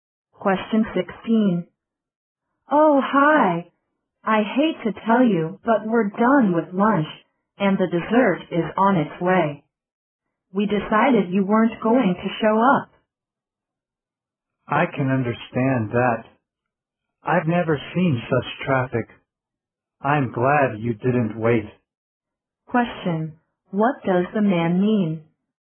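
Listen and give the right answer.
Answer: He was held up by heavy traffic and is glad they didn't wait.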